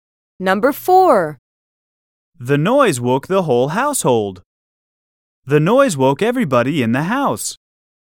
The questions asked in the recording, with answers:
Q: The noise woke the whole household.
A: Same is the correct answer.